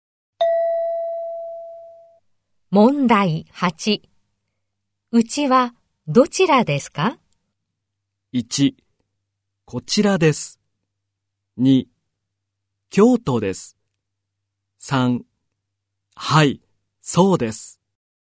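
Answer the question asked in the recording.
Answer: 2: 京都です。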